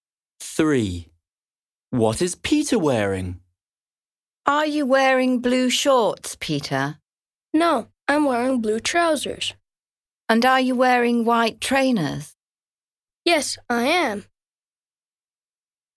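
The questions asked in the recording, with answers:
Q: What is Peter wearing?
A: Blue trousers and white trainers.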